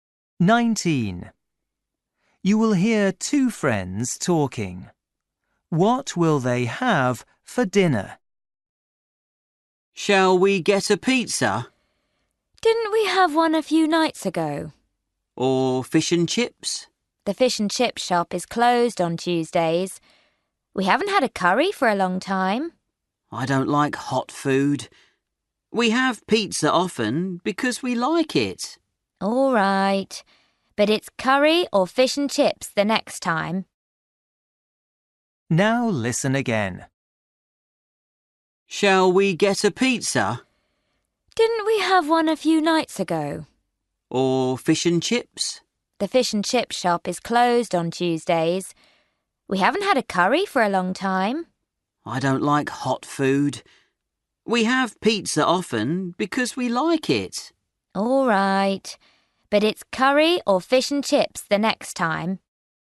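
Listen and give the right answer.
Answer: pizza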